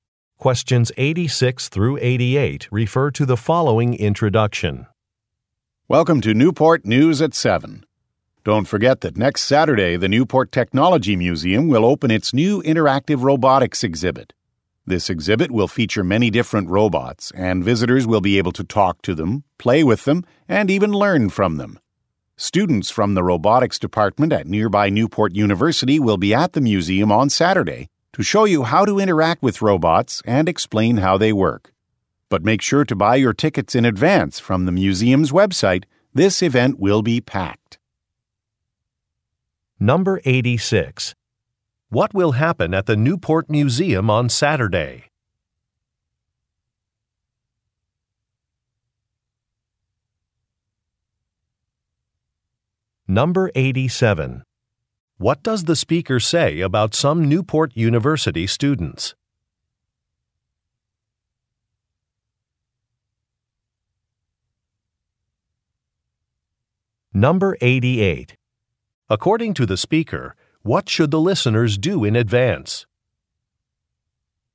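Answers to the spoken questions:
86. A new interactive robotics exhibit will open
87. They will show visitors how to interact with the robots and explain how they work
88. Buy tickets from the museum's website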